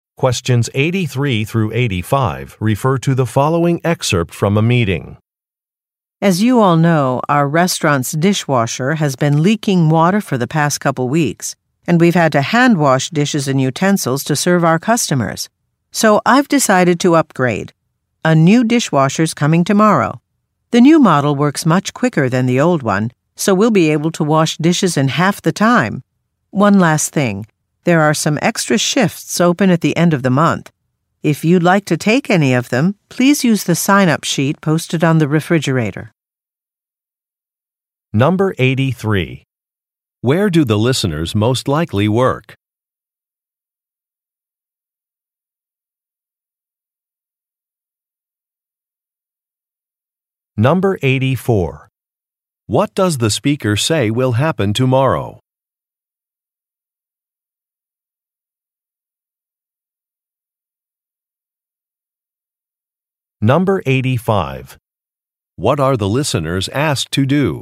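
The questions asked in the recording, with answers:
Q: Where do the listeners most likely work?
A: At a restaurant

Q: What does the speaker say will happen tomorrow?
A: A new dishwasher will arrive

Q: What are the listeners asked to do?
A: Use the sign-up sheet on the refrigerator to take extra shifts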